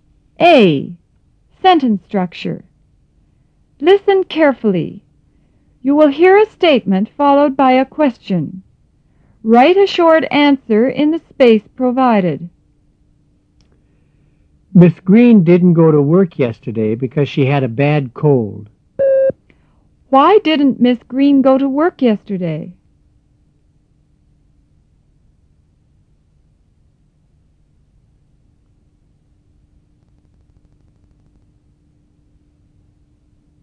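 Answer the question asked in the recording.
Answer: Because she had a bad cold.

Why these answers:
Miss Green didn't go to work yesterday because she had a bad cold.

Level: 入门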